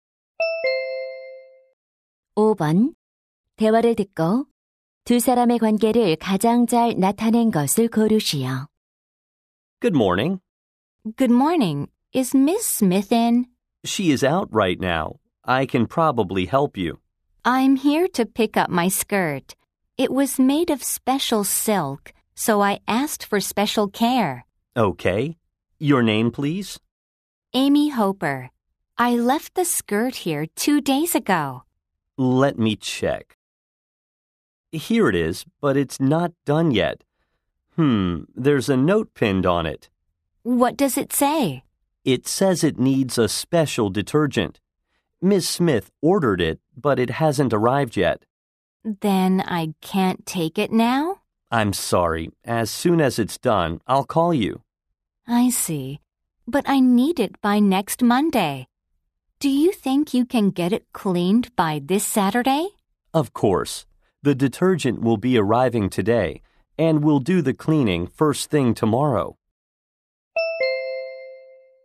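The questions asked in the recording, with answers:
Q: 대화를 듣고 두 사람의 관계를 가장 잘 나타낸 것을 고르시오.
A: 세탁소 직원 - 손님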